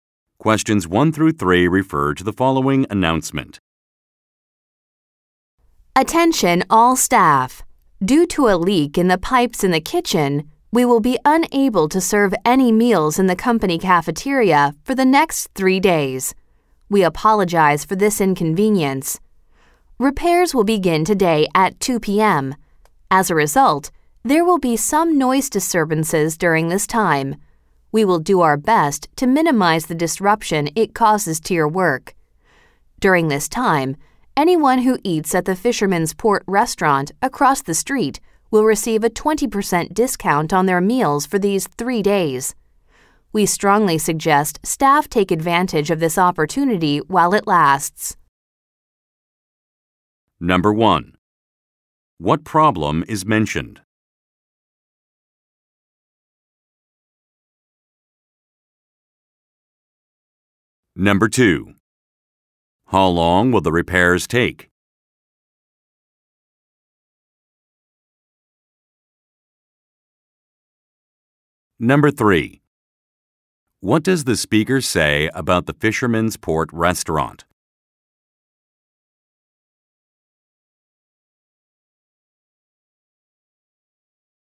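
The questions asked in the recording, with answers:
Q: What problem is mentioned?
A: A leak in the kitchen pipes

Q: How long will the repairs take?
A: 3 days

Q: What does the speaker say about the Fisherman's Port restaurant?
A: Staff will get a 20% discount on meals there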